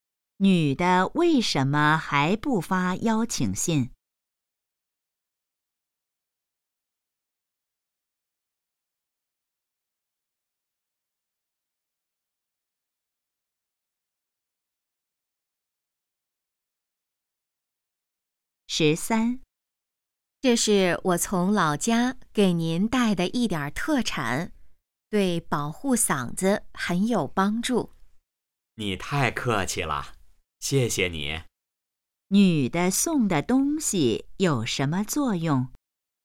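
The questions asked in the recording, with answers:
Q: 女的送的东西有什么作用?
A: 保护嗓子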